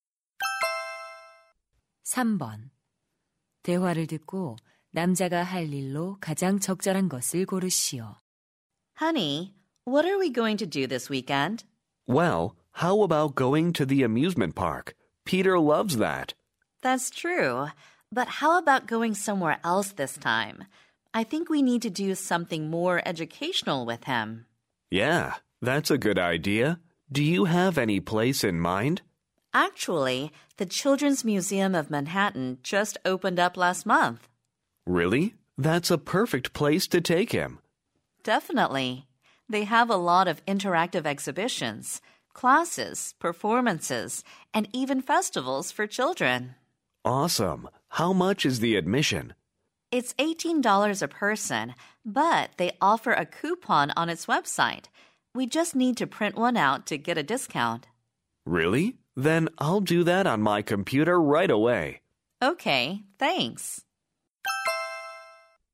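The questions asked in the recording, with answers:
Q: 대화를 듣고 남자가 할 일로 가장 적절한 것을 고르시오.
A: 할인 쿠폰 인쇄하기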